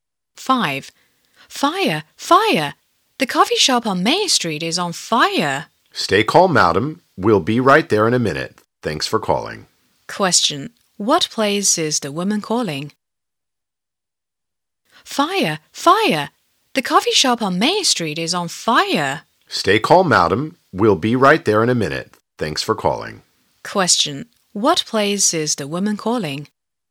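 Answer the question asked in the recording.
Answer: The fire station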